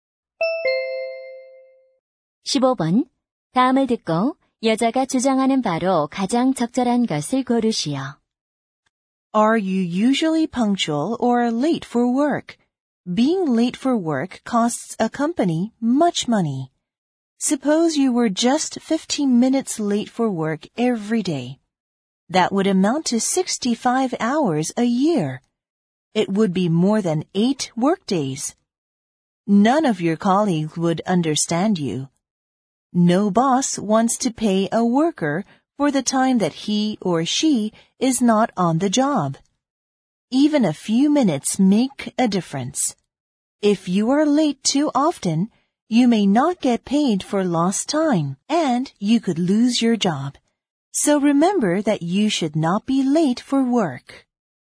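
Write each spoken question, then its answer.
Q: 다음을 듣고 여자가 주장하는 바로 가장 적절한 것을 고르시오.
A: 직장에 지각하지 말아야 한다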